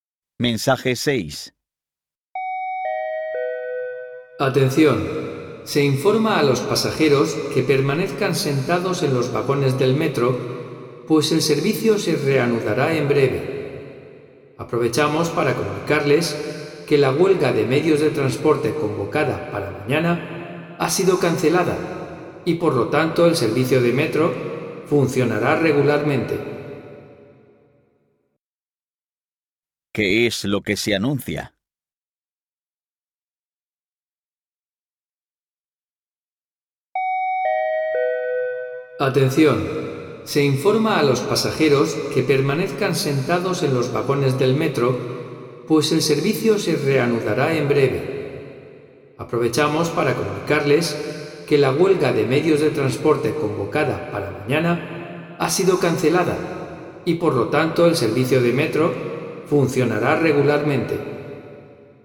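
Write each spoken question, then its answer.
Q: ¿Qué es lo que se anuncia?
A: Que la huelga de transportes de mañana ha sido cancelada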